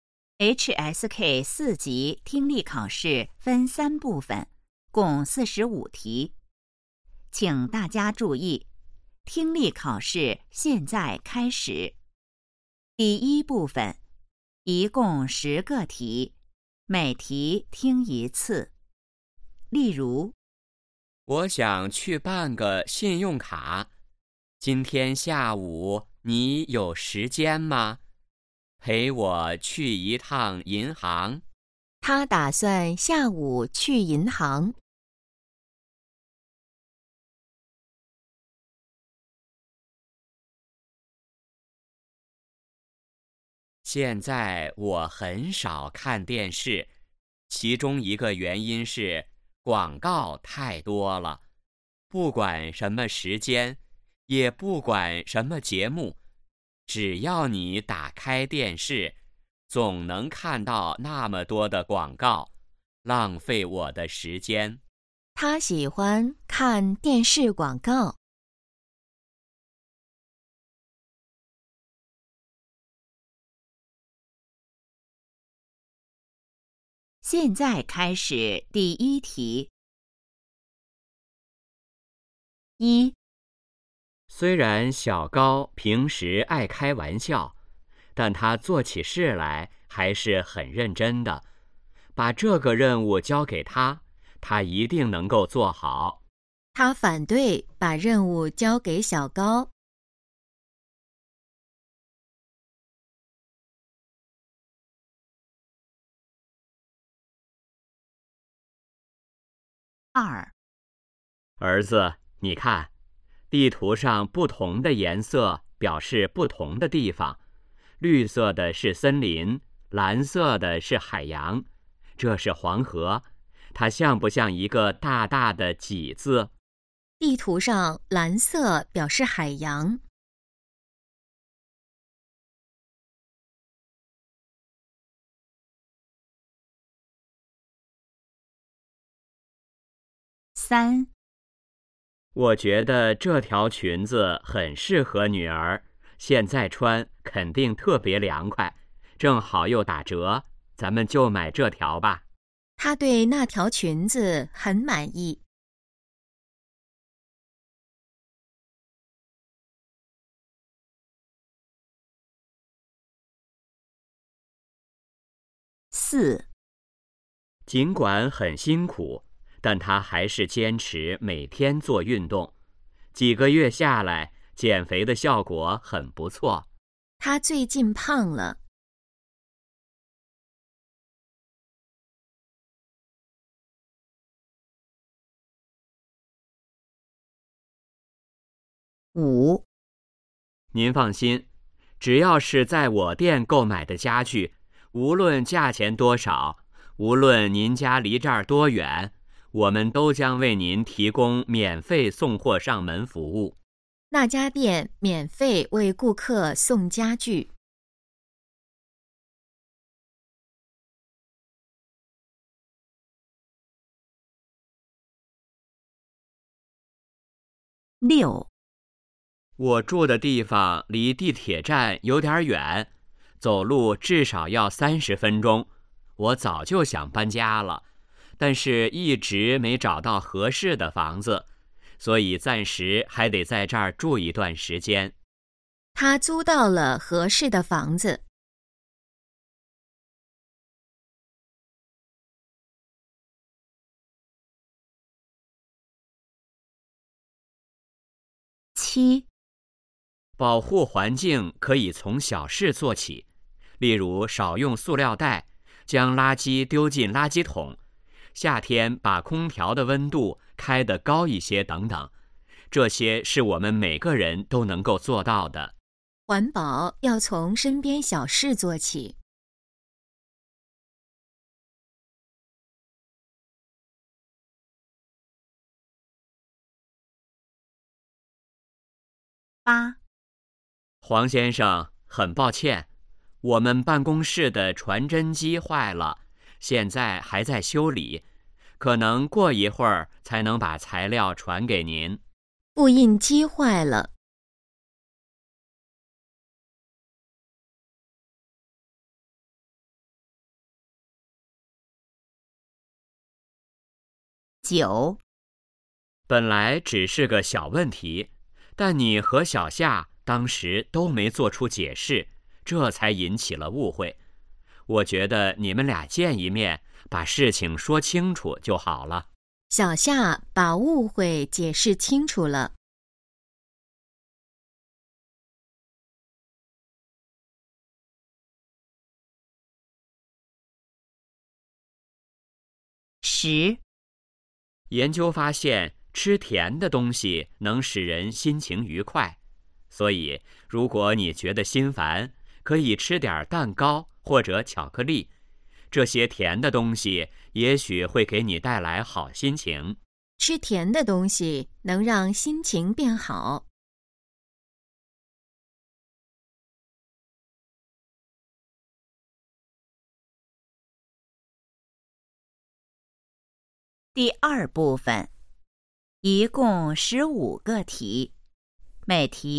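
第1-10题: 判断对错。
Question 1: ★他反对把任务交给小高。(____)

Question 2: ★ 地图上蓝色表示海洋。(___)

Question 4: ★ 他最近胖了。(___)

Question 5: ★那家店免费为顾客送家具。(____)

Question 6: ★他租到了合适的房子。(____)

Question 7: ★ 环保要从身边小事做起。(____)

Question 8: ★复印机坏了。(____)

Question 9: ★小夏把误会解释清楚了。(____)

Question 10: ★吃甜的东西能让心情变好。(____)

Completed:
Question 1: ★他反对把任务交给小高。(错)
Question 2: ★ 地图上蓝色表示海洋。(对)
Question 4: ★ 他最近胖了。(错)
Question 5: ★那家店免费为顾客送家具。(对)
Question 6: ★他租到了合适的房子。(错)
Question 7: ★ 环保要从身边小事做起。(对)
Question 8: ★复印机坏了。(错)
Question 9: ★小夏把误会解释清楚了。(错)
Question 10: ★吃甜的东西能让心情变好。(对)

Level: HSK 4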